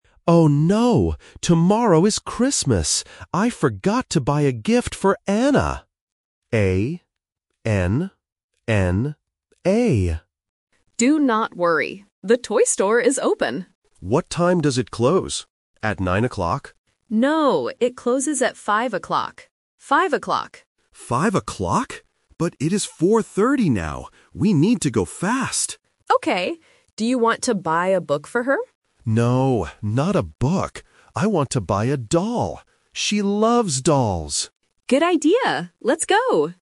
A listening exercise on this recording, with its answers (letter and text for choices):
Listen to the conversation and choose the correct answer (A, B, or C).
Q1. Who is the gift for?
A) Emma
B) Anna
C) Hannah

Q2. What time does the toy store close?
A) 4:30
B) 5:00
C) 9:00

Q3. What will the man buy for the girl?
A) A doll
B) A book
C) A teddy bear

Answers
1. B) Anna
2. B) 5:00
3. A) A doll

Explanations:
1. The man clearly says the name and spells it out: "A-N-N-A."
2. The woman answers his question by saying, "No, it closes at 5:00. Five o'clock."
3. The man says, "I want to buy a doll."

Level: A1